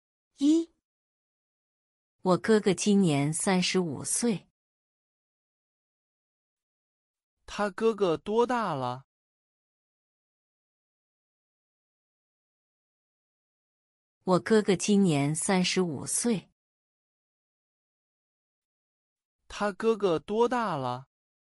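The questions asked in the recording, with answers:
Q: 他哥哥多大了?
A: 35岁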